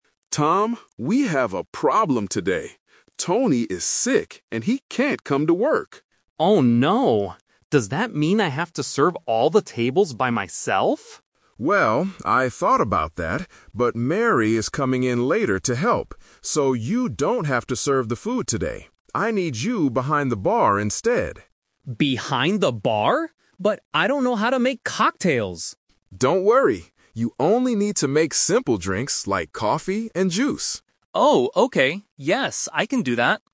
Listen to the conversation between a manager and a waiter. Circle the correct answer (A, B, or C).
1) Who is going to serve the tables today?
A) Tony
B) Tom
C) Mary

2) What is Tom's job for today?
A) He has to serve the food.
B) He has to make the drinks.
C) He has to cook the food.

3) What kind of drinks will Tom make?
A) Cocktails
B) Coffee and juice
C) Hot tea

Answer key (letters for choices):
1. C
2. B
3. B

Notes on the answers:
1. Mr. Evans says, "...Mary is coming in later to help." Option (A) is a trap because Tony is the one who is sick. Option (B) is also a trap because Tom asks if he has to do it, but the manager says no.
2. The manager tells Tom, "I need you behind the bar instead" and asks him to make drinks. Option (A) is the trap: Tom usually serves food, but today the manager explicitly says, "...you don't have to serve the food today." Option (C) is a plausible restaurant job, but it is not mentioned.
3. Mr. Evans clearly tells him, "You only need to make simple drinks like coffee and juice." Option (A) is the trap: Tom mentions "cocktails" because he is worried he doesn't know how to make them. Option (C) is a plausible simple drink, but it is not mentioned in the audio.

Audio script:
Mr. Evans: Tom, we have a problem today. Tony is sick and he can't come to work.
Tom: Oh no. Does that mean I have to serve all the tables by myself?
Evans: Well, I thought about that, but Mary is coming in later to help. So, you don't have to serve the food today. I need you behind the bar instead.
Tom: Behind the bar? But I don't know how to make cocktails!
Evans: Don't worry. You only need to make simple drinks like coffee and juice.